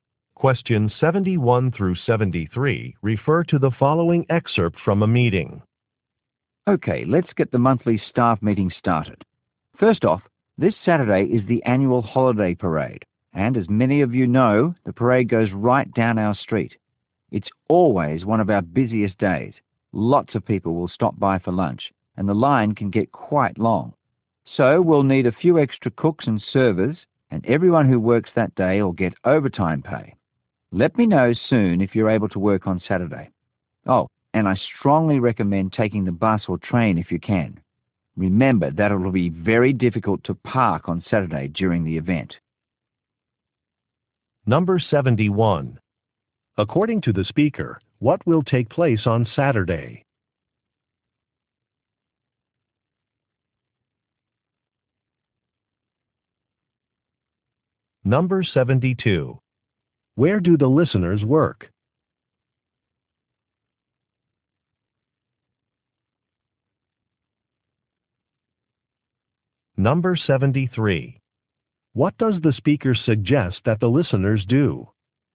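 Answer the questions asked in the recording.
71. A holiday parade
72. At a restaurant
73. Take public transportation (bus or train)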